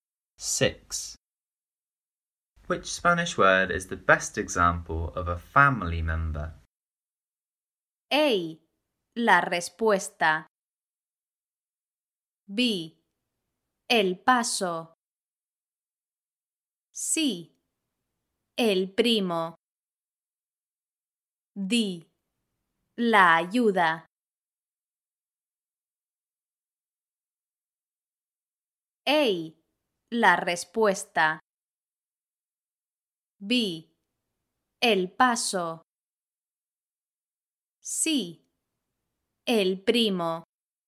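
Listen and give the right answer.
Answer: C: El primo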